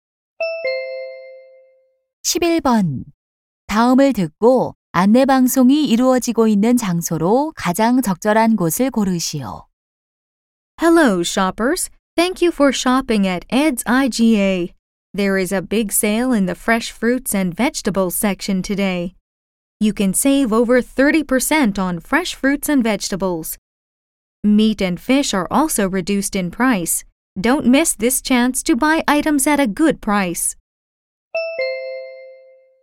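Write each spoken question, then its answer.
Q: 다음을 듣고 안내 방송이 이루어지고 있는 장소로 가장 적절한 곳을 고르시오.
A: 슈퍼마켓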